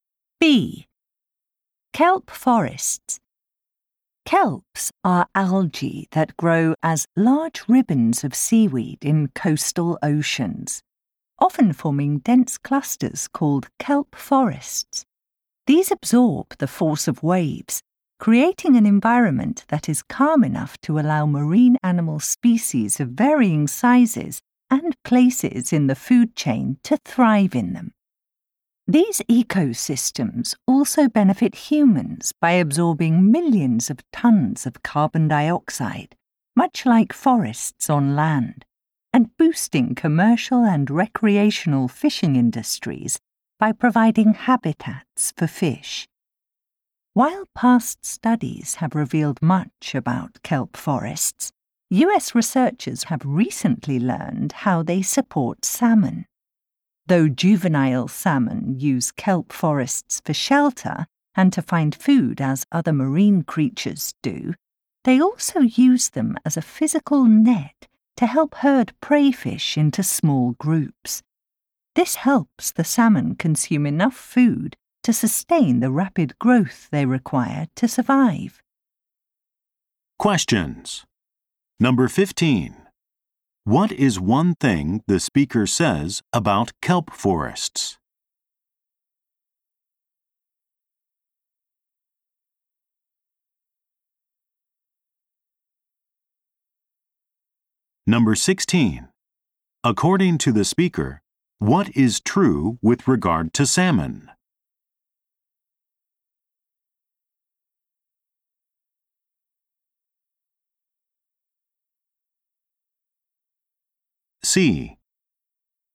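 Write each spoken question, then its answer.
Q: What is one thing the speaker says about kelp forests?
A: They absorb wave force, creating calm habitats, and they absorb large amounts of carbon dioxide.

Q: According to the speaker, what is true with regard to salmon?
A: Young salmon use kelp as a net to herd prey fish into small groups.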